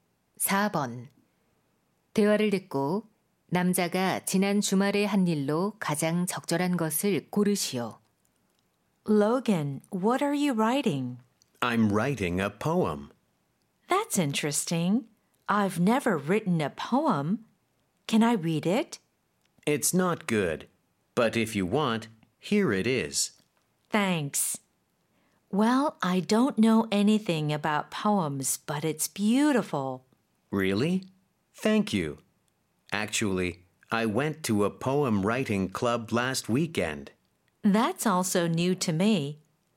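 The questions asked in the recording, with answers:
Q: 대화를 듣고 남자가 지난 주말에 한 일로 가장 적절한 것을 고르시오.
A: 시 쓰기 동아리에 감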